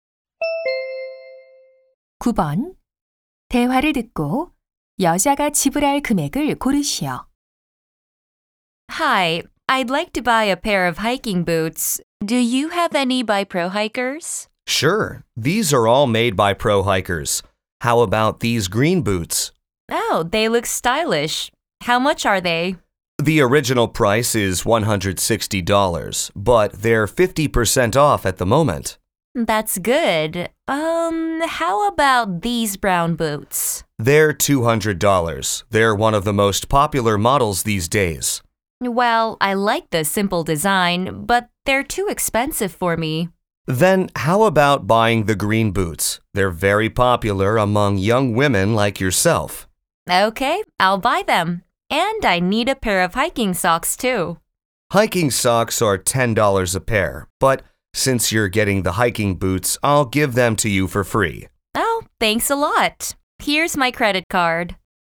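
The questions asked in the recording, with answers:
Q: 대화를 듣고 여자가 지불할 금액을 고르시오.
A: $80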